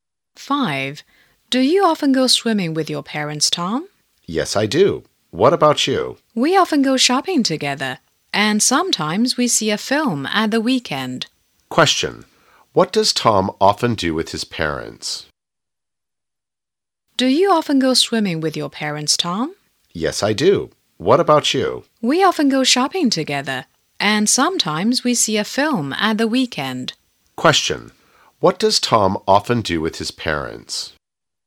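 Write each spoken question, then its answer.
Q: What does Tom often do with his parents?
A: He often goes swimming with them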